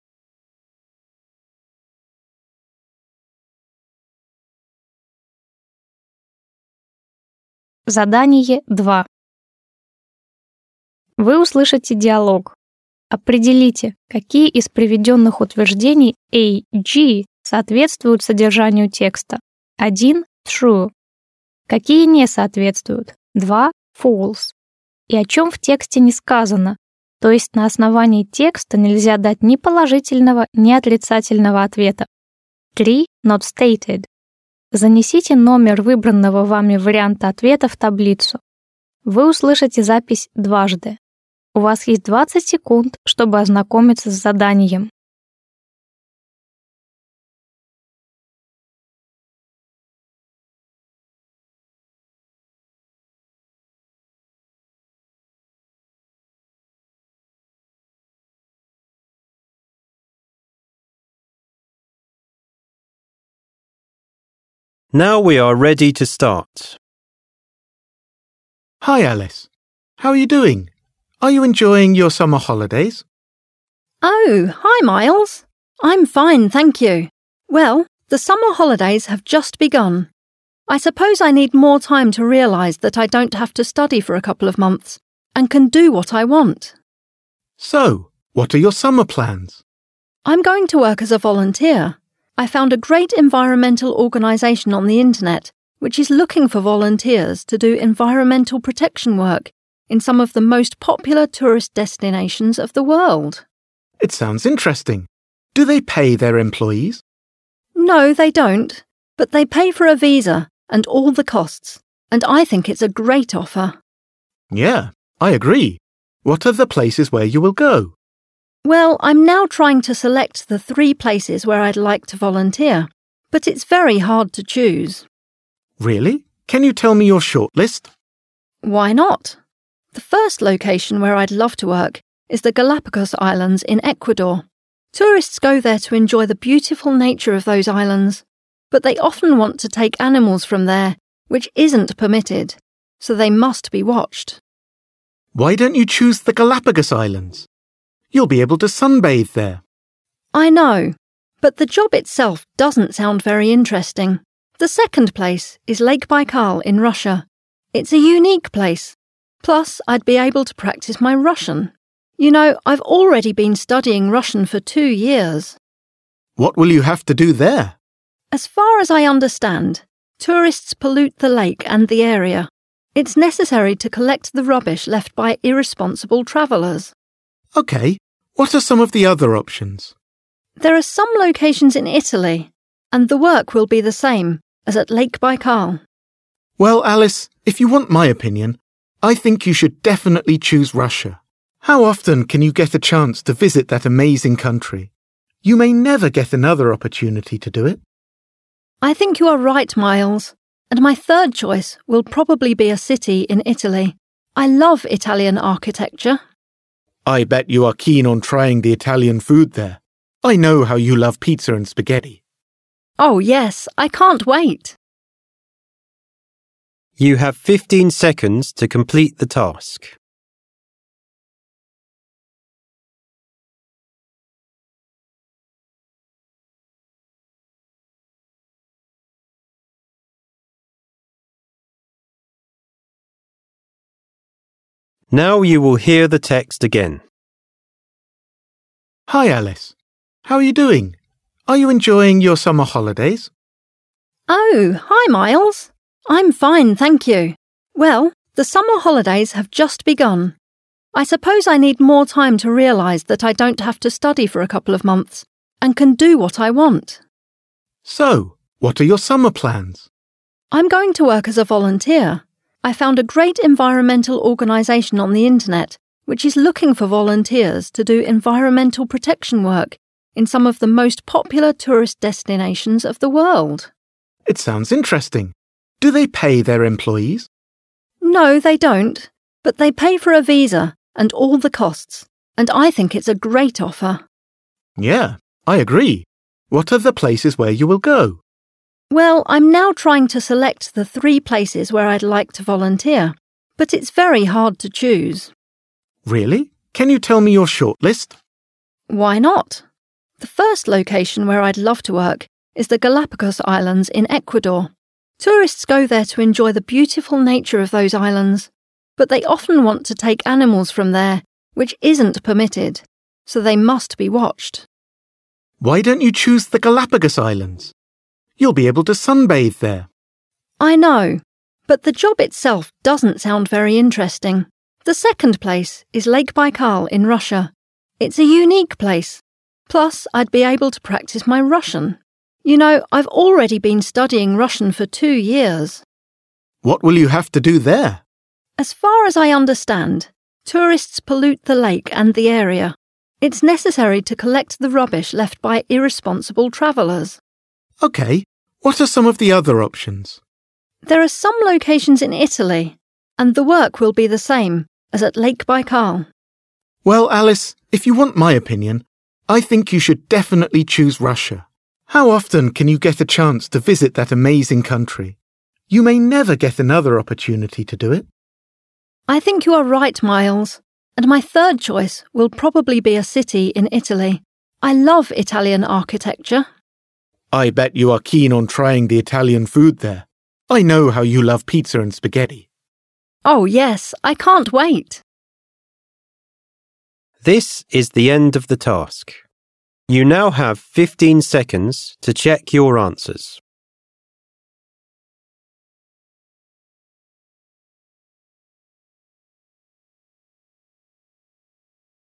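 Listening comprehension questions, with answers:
Вы услышите диалог. Определите, какие из приведённых утверждений А-G соответствуют содержанию текста (1 - True), какие не соответствуют (2 - False) и о чём в тексте не сказано, то есть на основании текста нельзя дать ни положительного, ни отрицательного ответа (3 - Not stated). Запишите ответ последовательностью из 7 цифр. Вы услышите запись дважды.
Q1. Alice's summer holidays will be over soon.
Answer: False

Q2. Alice is going to get paid for her volunteer work.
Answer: False

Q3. Alice has visited the Galapagos islands before.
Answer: Not stated

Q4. Alice knows some Russian.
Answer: True

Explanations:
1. каникулы только начались, поэтому утверждение о том, что они скоро закончатся, - неправда

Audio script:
Myles: Hi. Alice. How you doing? Are you enjoying your summer holidays?
Alice: Oh, hi, Myles! I'm fine, thank you. I suppose I need more time to realize that I don't have to study for a couple of months (пару месяцев учёбы не будет) and can do what I want.
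Myles: So, what are your summer plans?
Alice: I'm going to work as a volunteer. I found a great environmental organization on the Internet, which is looking for volunteers to do environmental protection work in some of the most popular tourist destinations of the world.
Myles: It sounds interesting. Do they pay their employees?
But they pay for a visa and all the costs. And I think it's a great offer.
Myles: Yeah. I agree. What are the places where you will go?
Alice: Well, I'm now trying to select the three places where I'd like to volunteer, but it's very hard to choose.
Myles: Really, can you tell me your shortlist?
Alice: Why not? Tourists go there to enjoy the beautiful nature of those islands. But they often want to take animals from there, which isn't permitted. So they must be watched.
Myles: Why don't you choose the Galapagos Islands? You'll be able to sunbathe there.
Alice: I know. 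But the job itself doesn't sound very interesting. The second place is Lake Baikal in Russia. It's a unique place. Plus, I'd be able to practice my Russian.
Myles: What will you have to do there?
Alice: As far as I understand, tourists pollute the lake and the area, it's necessary to collect the rubbish left by irresponsible travelers.
Myles: Okay, what are some of the other options?
Alice: There are some locations in Italy, and the work will be the same as at Lake Baikal.
Myles: Well, Alice, if you want my opinion, I think you should definitely choose Russia. How often can you get a chance to visit that amazing country?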